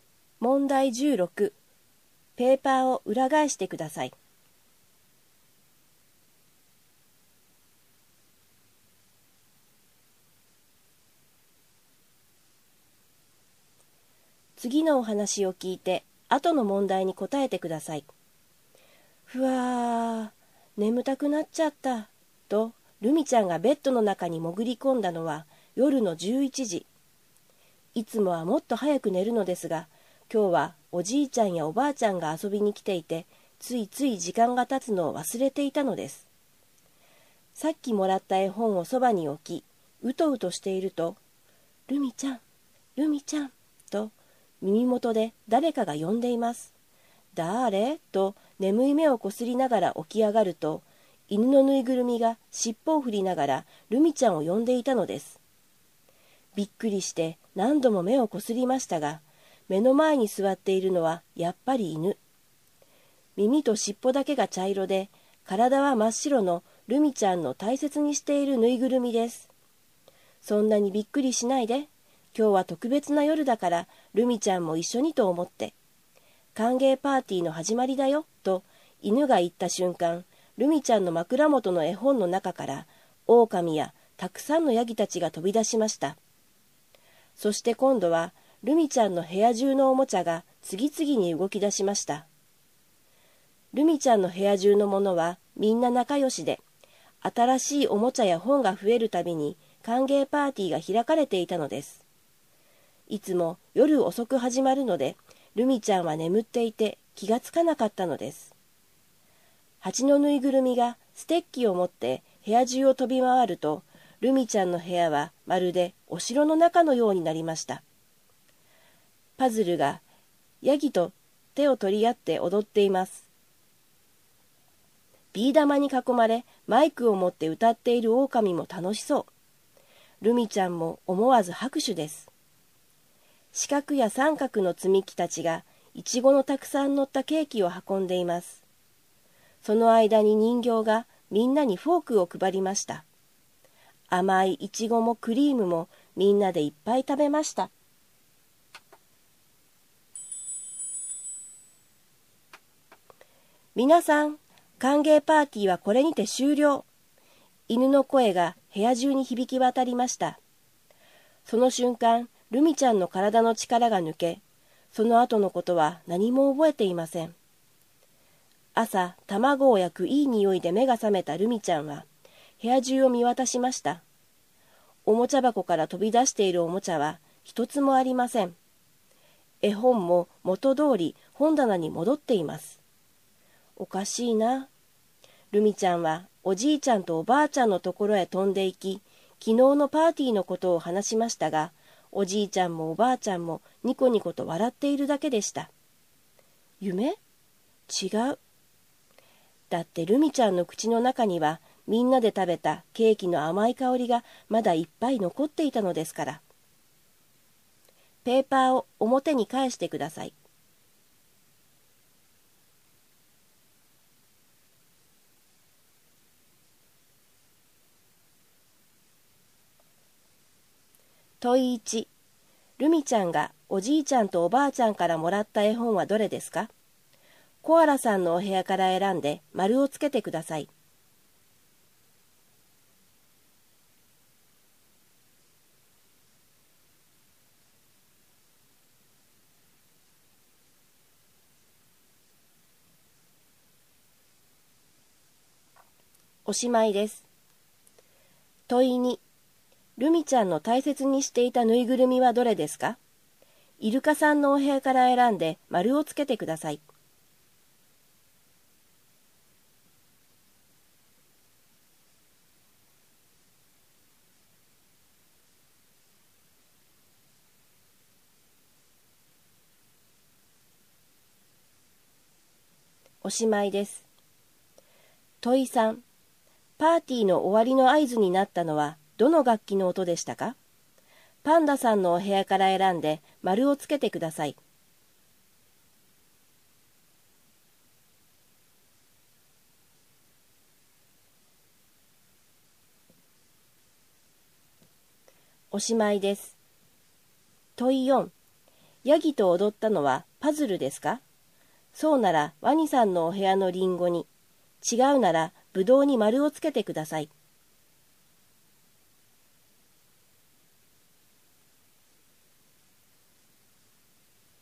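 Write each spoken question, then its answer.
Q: ルミちゃんがおじいちゃんとおばあちゃんからもらった絵本はどれですか?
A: 狼とヤギたちの絵本

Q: ルミちゃんの大切にしていたぬいぐるみはどれですか?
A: 耳と尻尾が茶色で体が真っ白の犬のぬいぐるみ

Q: ヤギと踊ったのはパズルですか?そうならワニさんのお部屋のリンゴに、違うならブドウに丸をつけてください。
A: はい(リンゴ)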